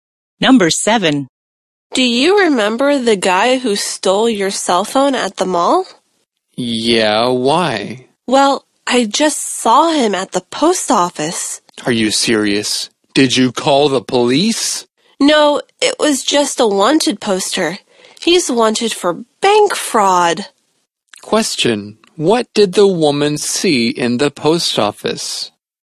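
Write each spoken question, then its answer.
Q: what did the woman see in the post office?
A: A wanted poster of the man who stole her phone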